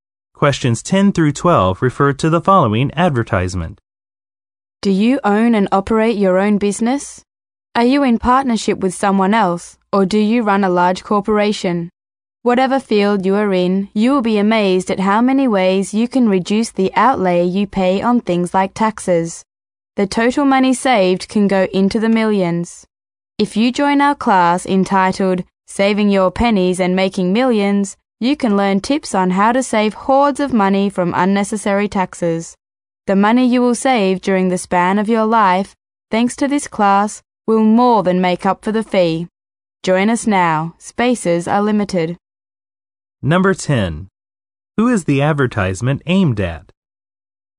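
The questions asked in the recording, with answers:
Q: Who is the advertisement aimed at?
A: Business owners and operators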